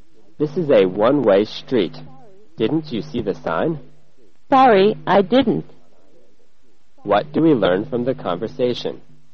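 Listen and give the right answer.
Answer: The speaker drove the wrong way down a one-way street because they missed the sign.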